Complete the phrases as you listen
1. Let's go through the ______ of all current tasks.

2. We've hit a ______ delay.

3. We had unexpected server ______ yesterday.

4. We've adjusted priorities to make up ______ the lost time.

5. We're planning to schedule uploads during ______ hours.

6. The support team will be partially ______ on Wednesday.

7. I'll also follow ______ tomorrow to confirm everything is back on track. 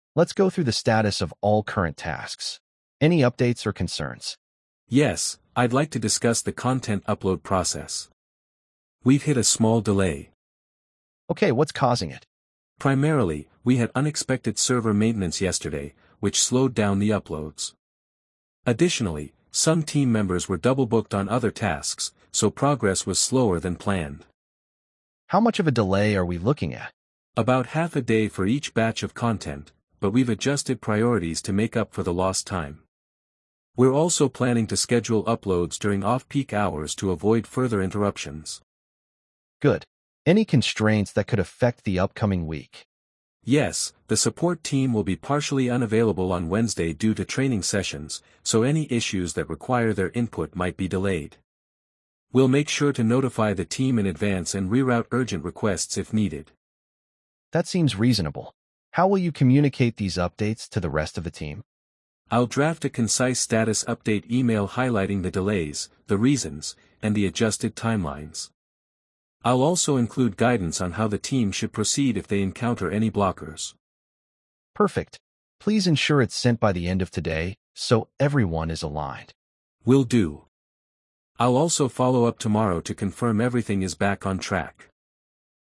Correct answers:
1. status
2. small
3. maintenance
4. for
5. off-peak
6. unavailable
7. up

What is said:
"Let's go through the status of all current tasks. Any updates or concerns?"
"Yes, I'd like to discuss the content upload process. We've hit a small delay."
"Okay, what's causing it?"
"Primarily, we had unexpected server maintenance yesterday, which slowed down the uploads. Additionally, some team members were double-booked on other tasks, so progress was slower than planned."
"How much of a delay are we looking at?"
"About half a day for each batch of content, but we've adjusted priorities to make up for the lost time. We're also planning to schedule uploads during off-peak hours to avoid further interruptions."
"Good. Any constraints that could affect the upcoming week?"
"Yes, the support team will be partially unavailable on Wednesday due to training sessions, so any issues that require their input might be delayed. We'll make sure to notify the team in advance and reroute urgent requests if needed."
"That seems reasonable. How will you communicate these updates to the rest of the team?"
"I'll draft a concise status update email highlighting the delays, the reasons, and the adjusted timelines. I'll also include guidance on how the team should proceed if they encounter any blockers."
"Perfect. Please ensure it's sent by the end of today so everyone is aligned."
"Will do. I'll also follow up tomorrow to confirm everything is back on track."
Perfect! "I'll also follow up tomorrow to confirm everything is back on track."